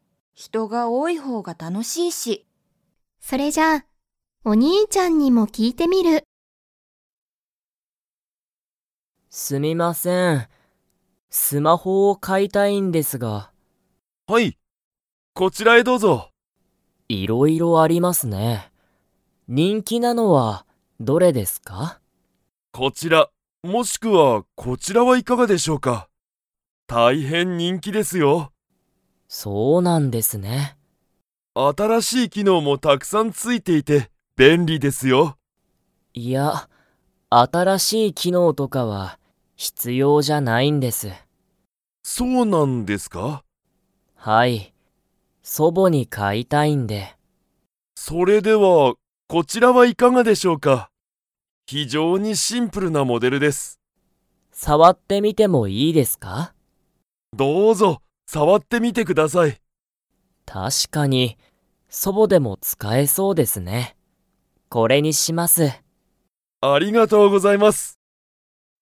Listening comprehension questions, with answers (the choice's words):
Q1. ナオキは にスマホを買(か)いたい。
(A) 自分(じぶん)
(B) 娘(むすめ)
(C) 母(はは)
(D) 祖母(そぼ)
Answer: 祖母(そぼ)

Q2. ナオキは、シンプルなスマホを買(か)いますか?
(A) はい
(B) いいえ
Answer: はい

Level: Level 4